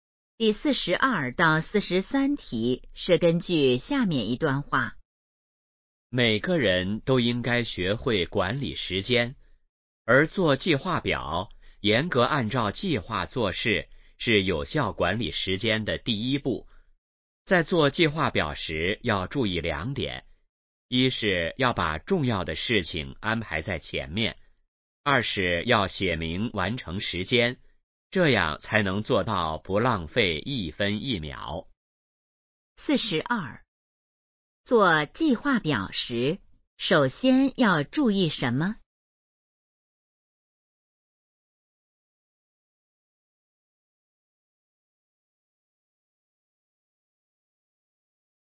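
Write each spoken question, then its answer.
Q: 做计划表时,首先要注意什么?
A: 把重要的事情安排在前面

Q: 这段话主要谈的是什么?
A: 如何管理时间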